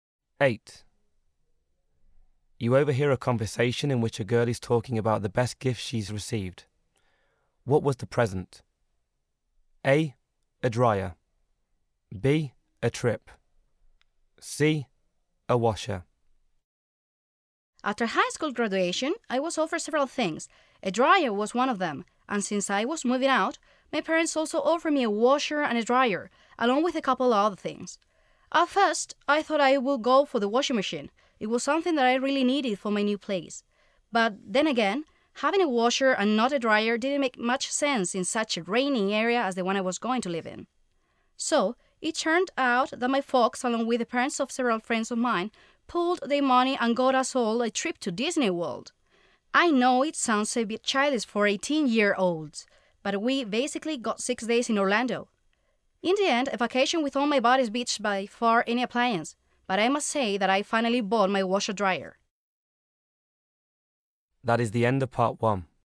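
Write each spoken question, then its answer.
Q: What was the present?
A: B: A trip.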